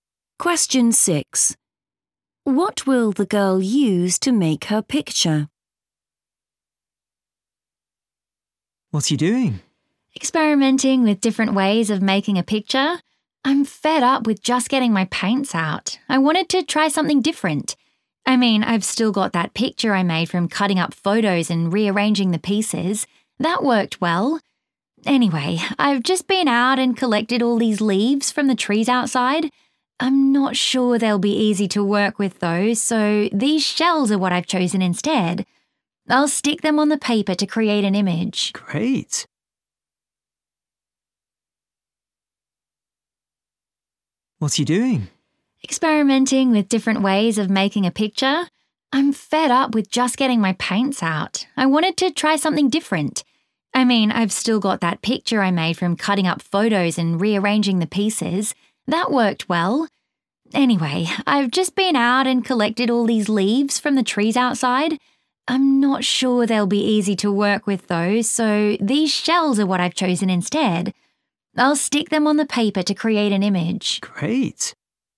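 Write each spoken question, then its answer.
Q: What will the girl use to make her picture?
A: shells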